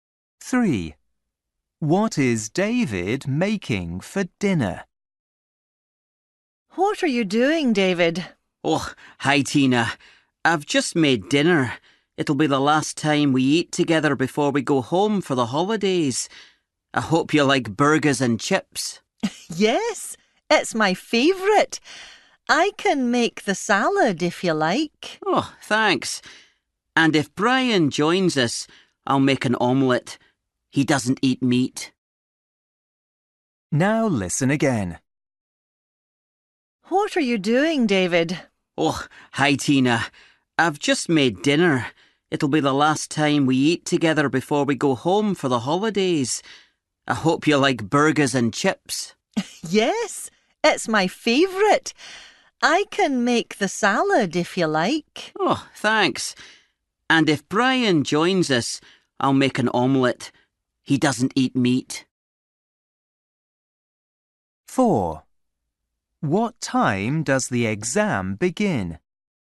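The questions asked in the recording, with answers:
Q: What is David making for dinner?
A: Burgers and chips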